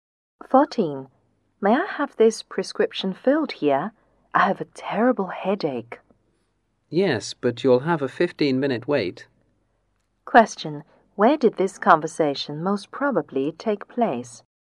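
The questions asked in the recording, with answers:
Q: Where did this conversation most probably take place?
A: At a pharmacy.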